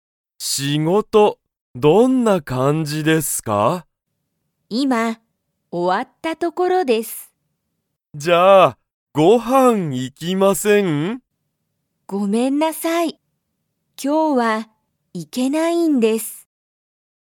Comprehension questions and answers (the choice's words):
松井まついさんは、____が今終いまおわった所ところだ。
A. ご飯はん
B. 学校がっこう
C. 電話でんわ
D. 仕事しごと (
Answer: 仕事しごと (

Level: Level 1